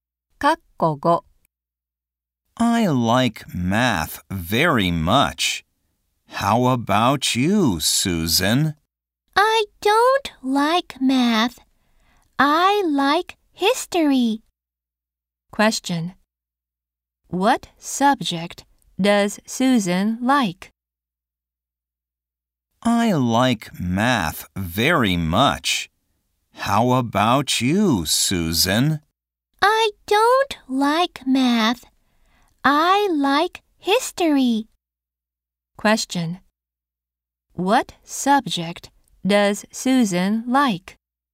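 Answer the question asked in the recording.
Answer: History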